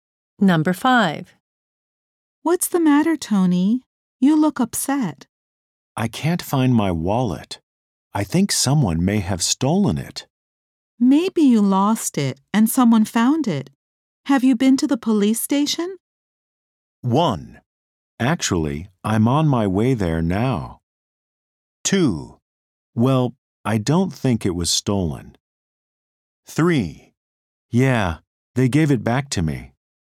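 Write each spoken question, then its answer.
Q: Have you been to the police station?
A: 1: Actually, I'm on my way there now.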